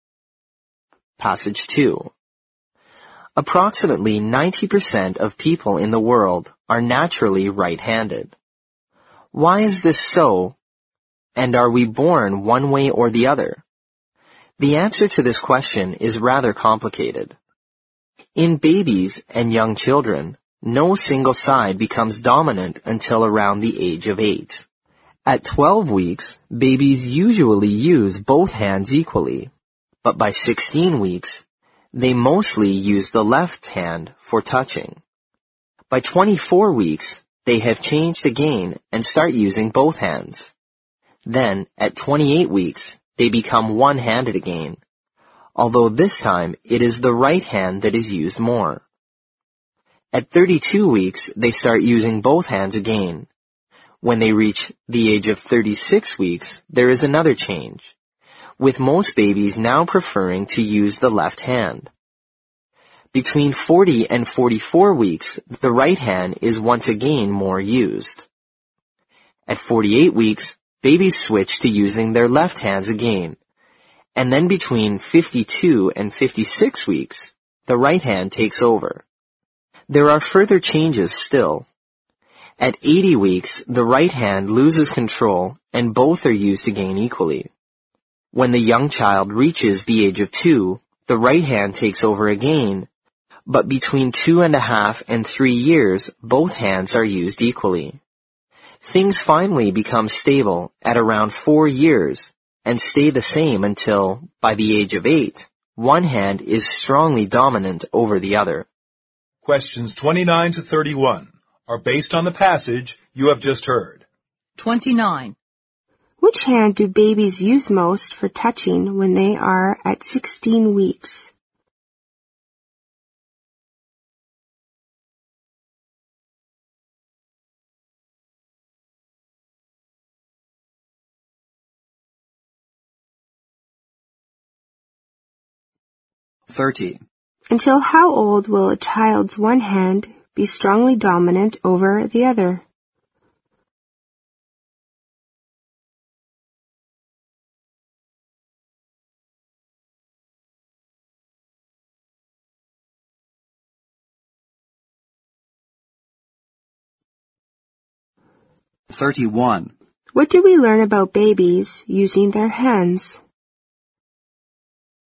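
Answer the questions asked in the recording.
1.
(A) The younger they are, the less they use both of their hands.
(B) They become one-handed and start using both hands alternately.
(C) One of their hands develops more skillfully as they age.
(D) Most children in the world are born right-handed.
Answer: (C) One of their hands develops more skillfully as they age.
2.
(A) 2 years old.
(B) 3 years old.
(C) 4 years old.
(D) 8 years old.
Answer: (D) 8 years old.
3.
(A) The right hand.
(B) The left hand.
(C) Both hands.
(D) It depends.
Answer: (B) The left hand.

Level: 新编四级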